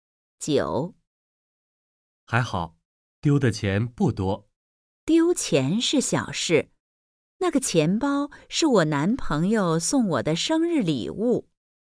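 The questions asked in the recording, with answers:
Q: 女的为什么不高兴?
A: 丢了男朋友送她的生日礼物钱包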